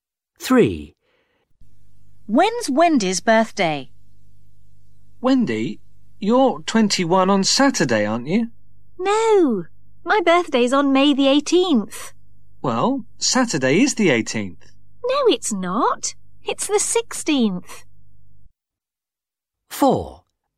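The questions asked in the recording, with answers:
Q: When's Wendy's birthday?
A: May 18th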